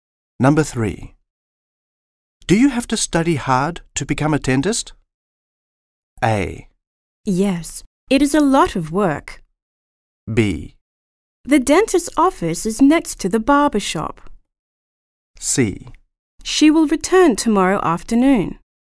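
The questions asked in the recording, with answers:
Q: Do you have to study hard to become a dentist?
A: A: Yes. It is a lot of work.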